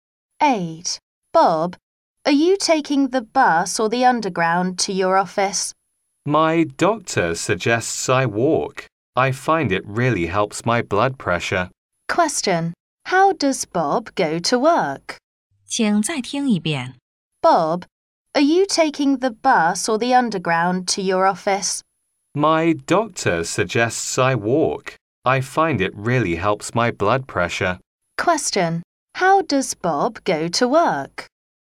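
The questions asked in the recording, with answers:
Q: How does Bob go to work?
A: He walks.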